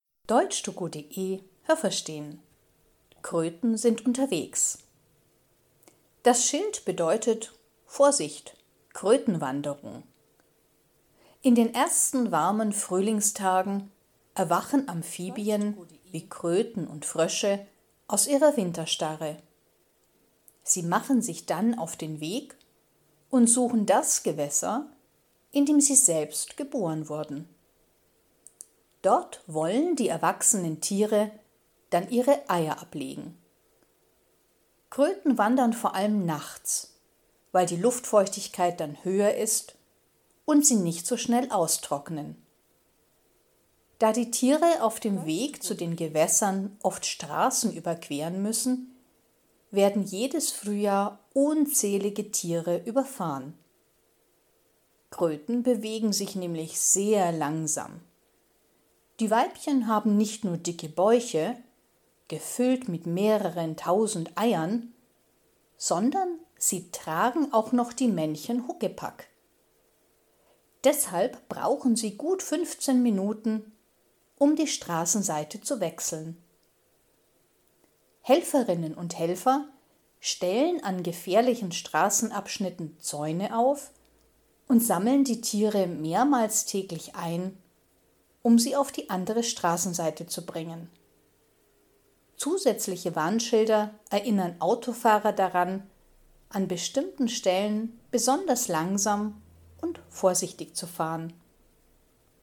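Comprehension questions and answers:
Haben Sie das gehört? Stimmt diese Aussage?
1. Im Winter machen die Kröten eine Wanderung.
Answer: Nein, das habe ich nicht gehört.

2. Die Kröten wollen ihre Eier dort ablegen, wo sie selber geboren sind.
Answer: Ja, das habe ich gehört.

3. Sie wandern vor allem nachts, weil die Luft dann trockener ist.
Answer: Nein, das habe ich nicht gehört.

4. Jedes Jahr sterben viele Tiere, wenn sie die Straße überqueren.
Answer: Ja, das habe ich gehört.

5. Die Weibchen haben den Bauch voller Eier und werden von den Männchen getragen.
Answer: Nein, das habe ich nicht gehört.

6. Eine Kröte braucht circa eine Viertelstunde, um eine Straße zu überqueren.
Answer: Ja, das habe ich gehört.

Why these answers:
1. Sie machen sich in den ersten Frühlingstagen auf den Weg.
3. Sie wandern nachts, weil die Luft dann feuchter ist und die Kröten nicht so schnell austrocknen.
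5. Die Weibchen transportieren nicht nur die Eier, sondern sie tragen auch noch die Männchen auf ihrem Rücken.

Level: B1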